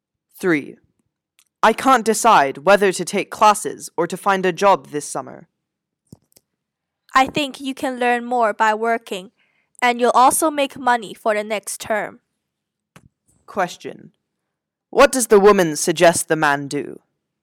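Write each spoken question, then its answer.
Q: What does the woman suggest the man do?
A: Find a job this summer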